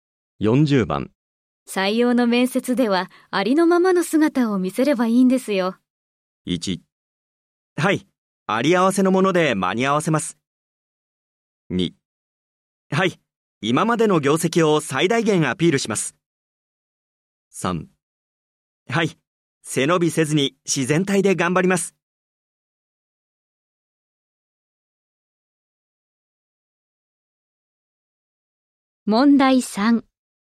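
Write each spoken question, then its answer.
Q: 採用の面接ではありのままの姿を見せればいいんですよ。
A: 3: はい、背伸びせずに自然体で頑張ります。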